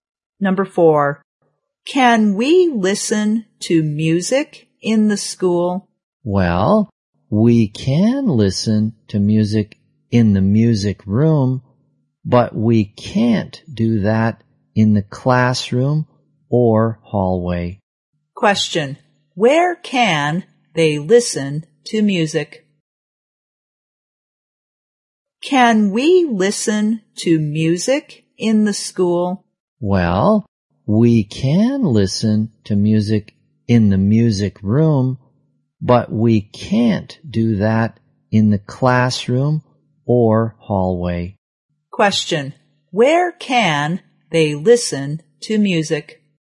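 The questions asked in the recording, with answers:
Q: where can they listen to music?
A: In the music room.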